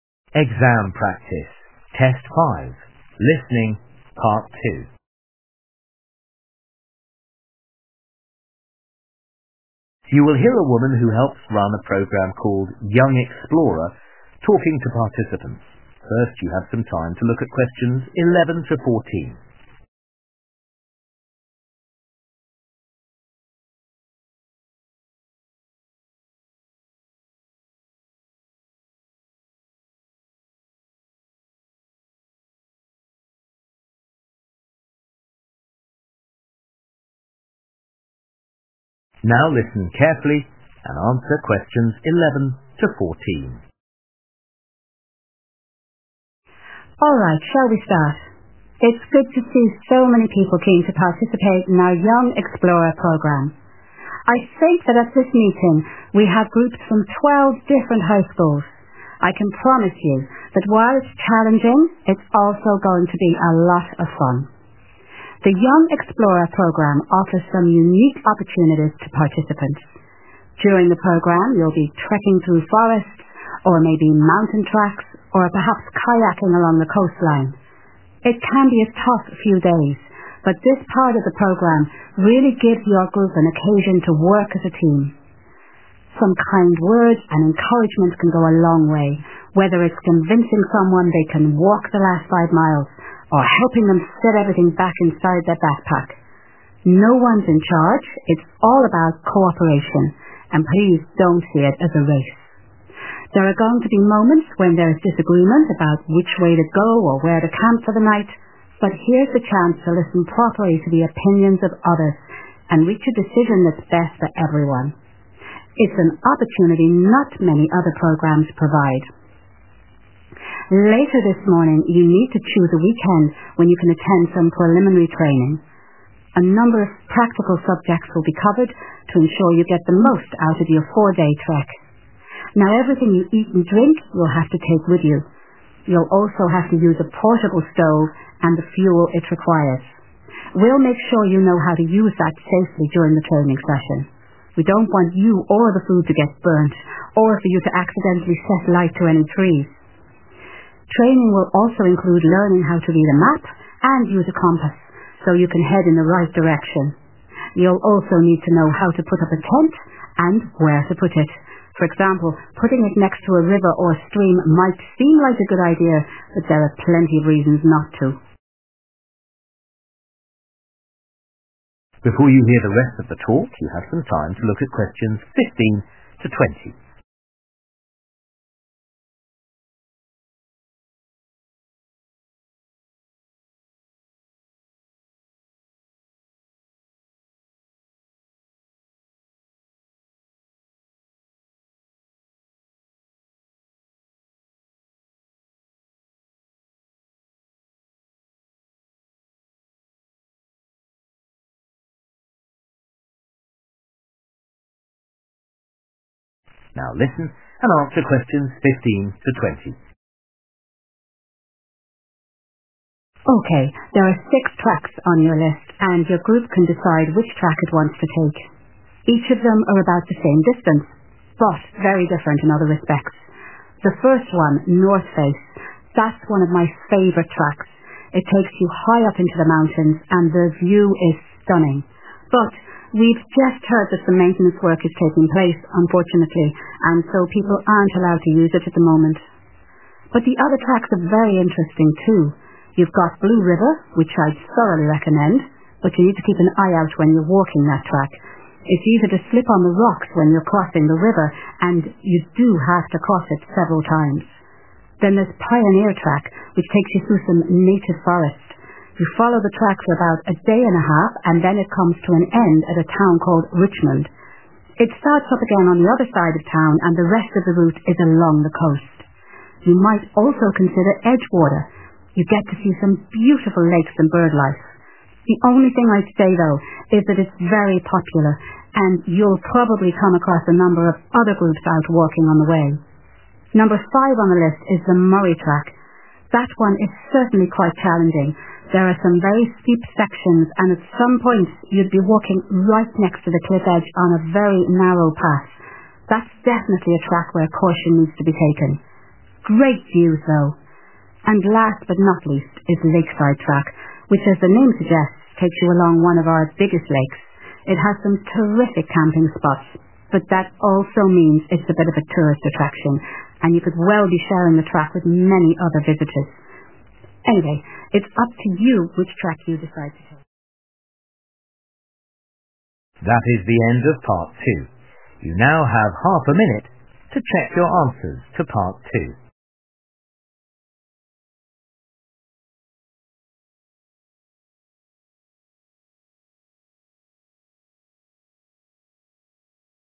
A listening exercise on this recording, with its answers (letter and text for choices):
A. It is likely to be busy.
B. It may be unsafe in places.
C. It is currently closed to the public.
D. It is divided into two sections.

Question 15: Northface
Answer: C. It is currently closed to the public.

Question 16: Blue River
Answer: B. It may be unsafe in places.

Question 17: Pioneer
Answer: D. It is divided into two sections.

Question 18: Edgewater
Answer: A. It is likely to be busy.

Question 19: Murray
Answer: B. It may be unsafe in places.

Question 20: Lakeside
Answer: A. It is likely to be busy.

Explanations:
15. But we've just heard that the maintenance work is taking place, unfortunately, and so people aren't allowed to use it at the moment. (=> C) [Nhưng chúng tôi vừa nghe nói rằng công việc bảo trì đang diễn ra, thật không may, và vì vậy mọi người không được phép sử dụng nó vào lúc này]
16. You've got Blue River, which I'd thoroughly recommend, but you need to keep an eye out when you're walking that track, it's easier to slip on the rocks when you're crossing the river, and you do have to cross it several times. (=> B) [Chúng ta có Blue River, nơi mà tôi muốn giới thiệu kỹ lưỡng, nhưng bạn cần chú ý khi đi trên con đường đó, bạn sẽ dễ trượt chân trên đá hơn khi băng qua sông và bạn phải vượt qua nó nhiều lần]
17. You follow the track for about a day and a half, and then it comes to an end at a town called Richmond. It starts up again on the other side of town, and the rest of the route is along the coast. (=> D) [Bạn đi theo con đường trong khoảng một ngày rưỡi, rồi nó kết thúc tại một thị trấn tên là Richmond. Nó bắt đầu lại ở phía bên kia của thị trấn, và phần còn lại của tuyến đường là dọc theo bờ biển.]
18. it's very popular, and you'll probably come across a number of other groups out walking on the way. (=> A) [nó rất nổi tiếng và có thể bạn sẽ bắt gặp một số nhóm khác đang đi bộ trên đường]
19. There are some very steep sections, and at some point you'd be walking right next to the cliff edge on a very narrow path. (=> B) [Có một số đoạn rất dốc, và đến một lúc nào đó bạn sẽ đi bộ ngay sát mép vách đá trên một con đường rất hẹp]
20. it's a bit of a tourist attraction, and you could well be sharing the track with many other visitors. (=> A) [đó là một điểm thu hút khách du lịch và bạn có thể sẽ cùng đi với nhiều du khách khác]